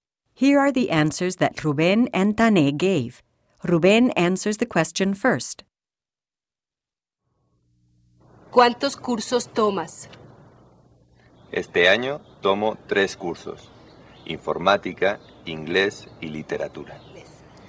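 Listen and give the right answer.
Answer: Rubén: 3 cursos (informática, inglés y literatura)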